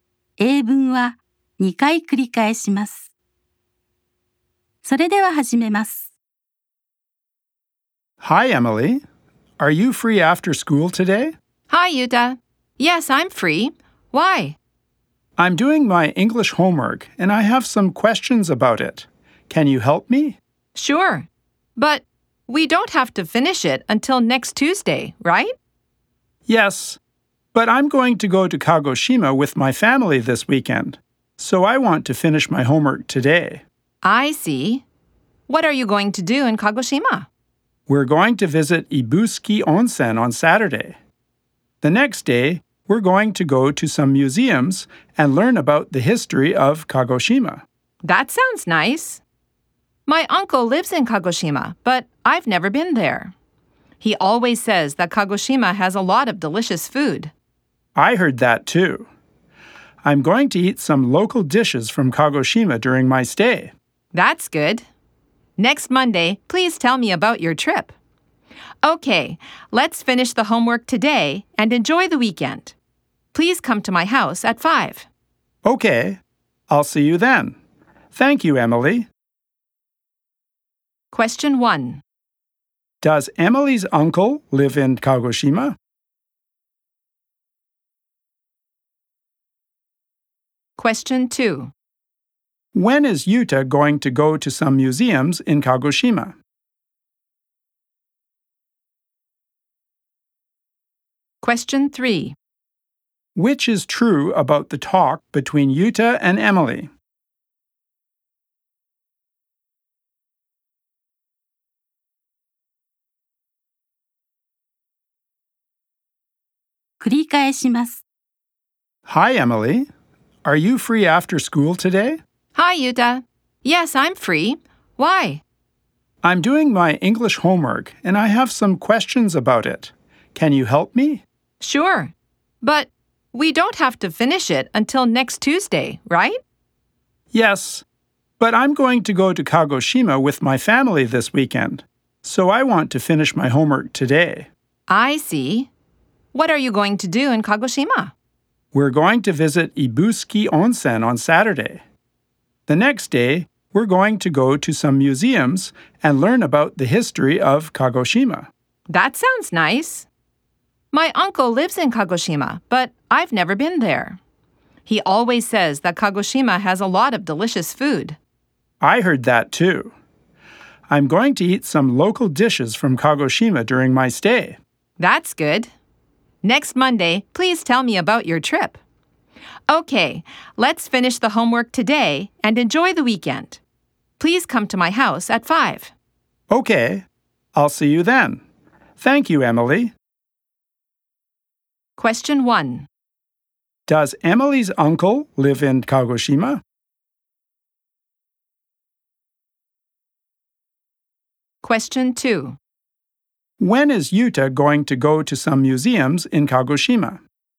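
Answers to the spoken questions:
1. Yes, he does.
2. On Sunday.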